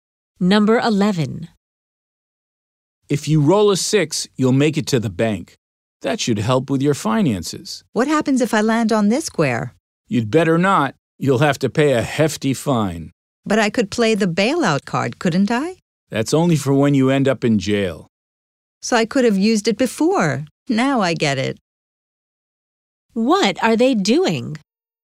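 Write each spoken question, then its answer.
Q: What are they doing?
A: Playing a board game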